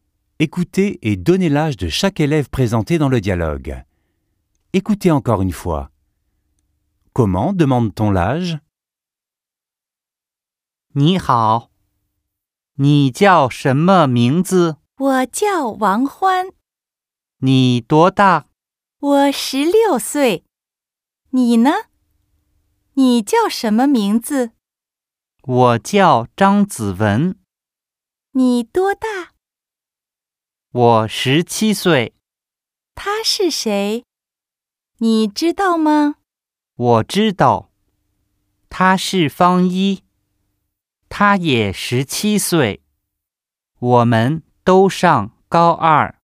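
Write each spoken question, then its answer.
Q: Écoutez et donnez l'âge de chaque élève présenté dans le dialogue.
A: Wang Huan a 16 ans, Zhang Ziwen a 17 ans, Fang Yi a 17 ans

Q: Comment demande-t-on l'âge?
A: 你多大?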